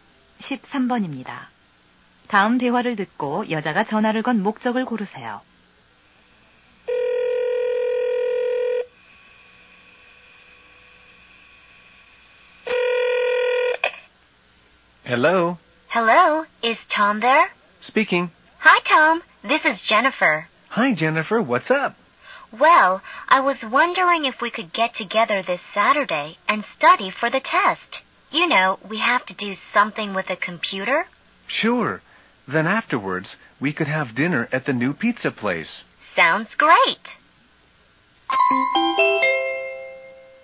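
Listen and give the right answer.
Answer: 토요일에 함께 시험 공부를 하자고 제안하려고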